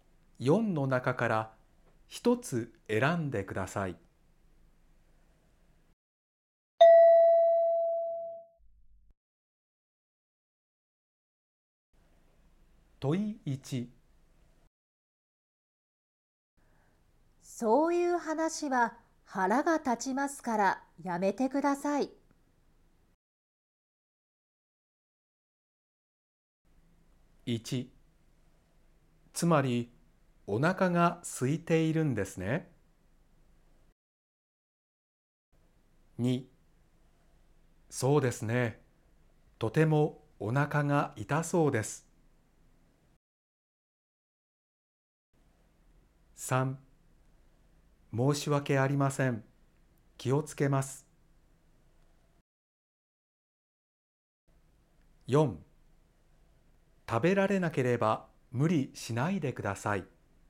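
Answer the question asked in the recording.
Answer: 3: 申し訳ありません、気をつけます。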